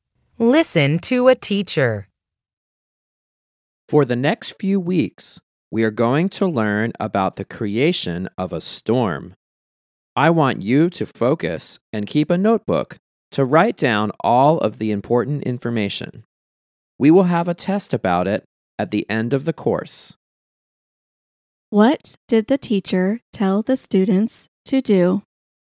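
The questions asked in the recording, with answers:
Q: What did the teacher tell the students to do?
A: Keep a notebook to write down important information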